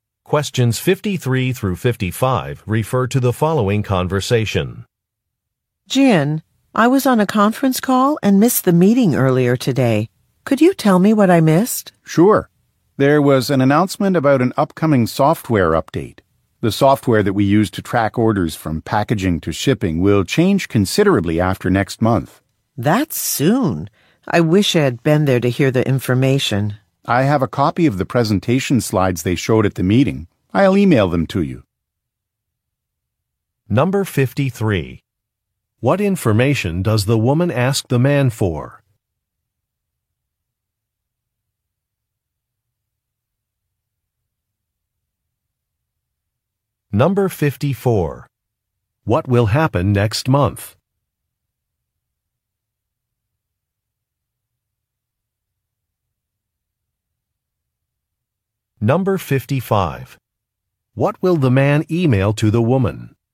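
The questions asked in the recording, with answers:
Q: What information does the woman ask the man for?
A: What was discussed at the meeting she missed

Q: What will happen next month?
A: The order-tracking software will be updated

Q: What will the man email to the woman?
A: The presentation slides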